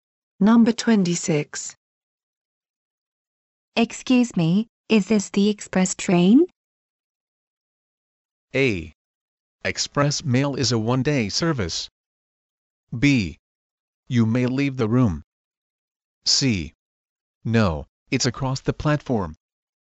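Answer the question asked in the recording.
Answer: C: No, it's across the platform.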